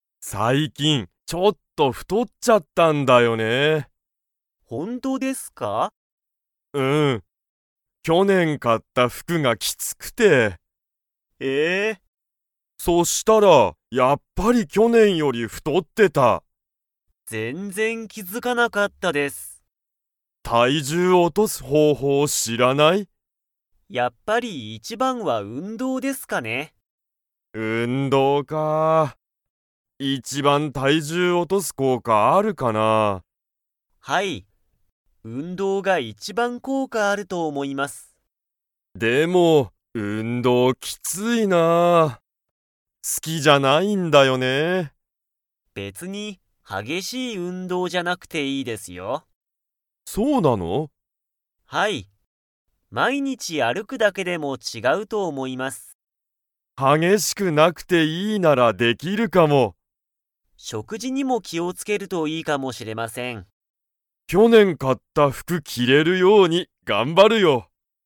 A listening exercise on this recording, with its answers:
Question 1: 山田やまださんは、去年きょねん買かった服ふくが 。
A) きつい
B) きつくない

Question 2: 佐藤さとうさんは、何なにが一番いちばん体重たいじゅう落おとす効果こうかがあると思おもっていますか?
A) 服ふく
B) 運動うんどう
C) 買かい物もの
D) 仕事しごと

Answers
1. A
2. B

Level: Level 4

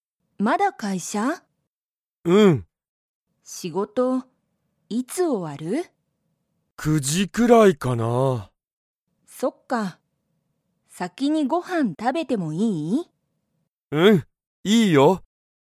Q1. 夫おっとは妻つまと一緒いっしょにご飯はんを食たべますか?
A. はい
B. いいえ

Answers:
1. B

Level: Level 1

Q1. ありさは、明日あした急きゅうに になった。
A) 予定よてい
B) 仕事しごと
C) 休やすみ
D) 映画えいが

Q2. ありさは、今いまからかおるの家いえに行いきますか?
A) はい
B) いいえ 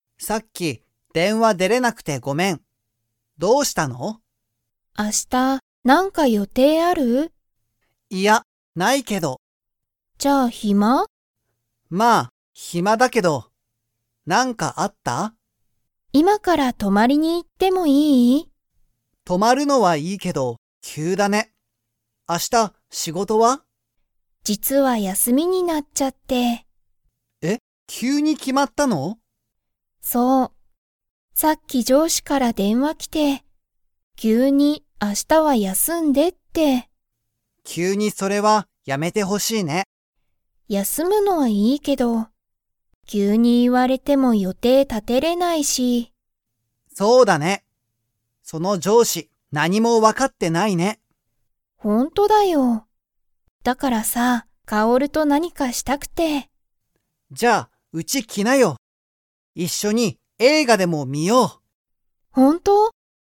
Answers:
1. C
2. A

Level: Level 4

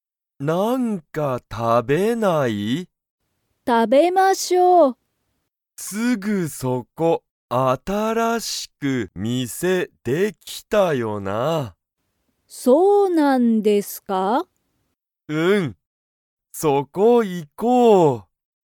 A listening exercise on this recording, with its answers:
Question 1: ハルキとヨウコは、新(あたら)しい店(みせ)に行(い)きますか?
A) はい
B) いいえ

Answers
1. A

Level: Level 1

